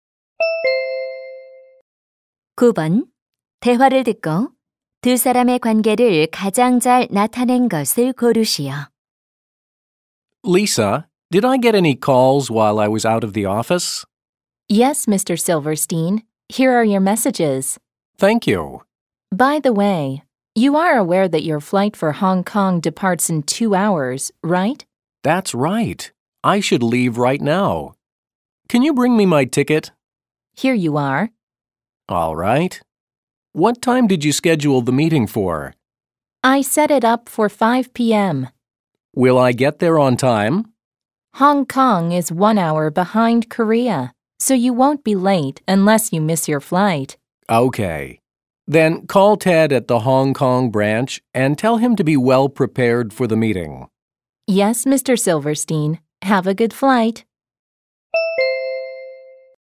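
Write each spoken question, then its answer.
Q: 대화를 듣고 두 사람의 관계를 가장 잘 나타낸 것을 고르시오.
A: 상사와 비서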